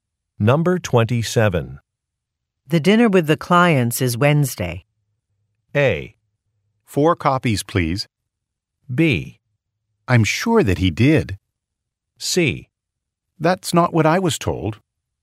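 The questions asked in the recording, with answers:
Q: The dinner with the clients is Wednesday.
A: C: That's not what I was told.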